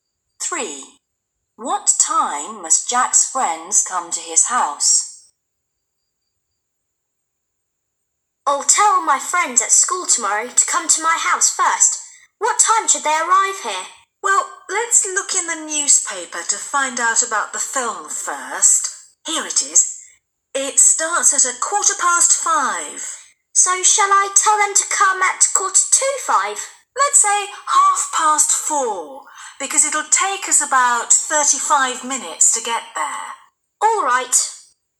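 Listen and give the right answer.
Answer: 4:30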